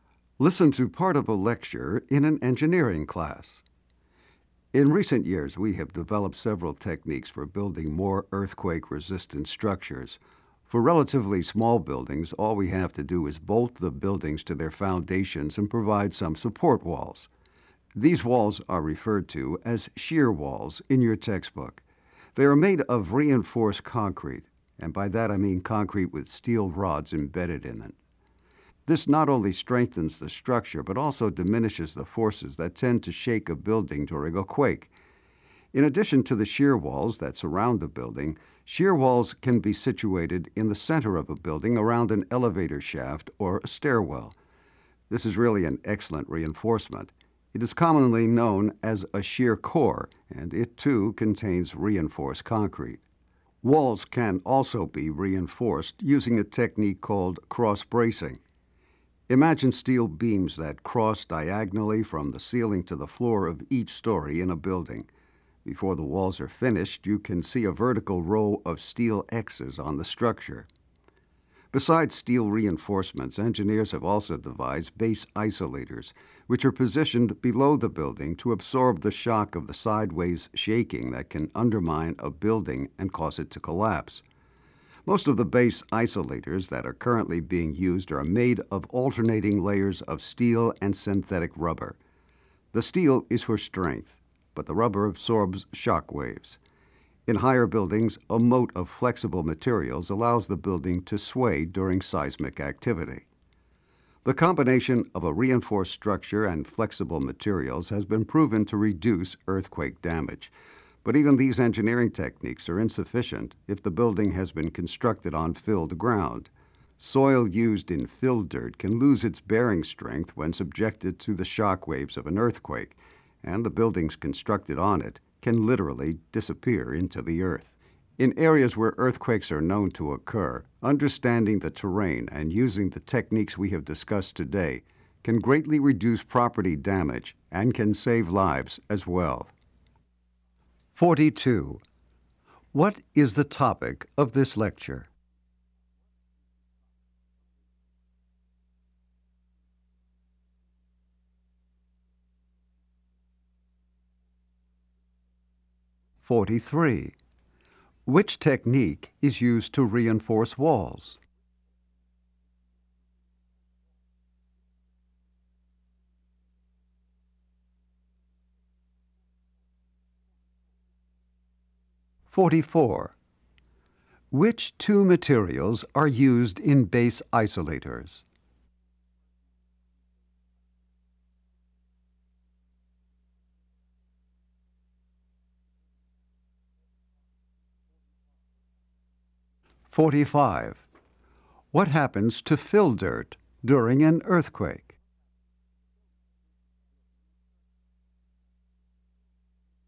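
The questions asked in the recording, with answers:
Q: What is the topic of this lecture?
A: Building techniques for earthquake-resistant structures

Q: Which two materials are used in base isolators?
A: Steel and synthetic rubber

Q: What happens to fill dirt during an earthquake?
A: It loses its bearing strength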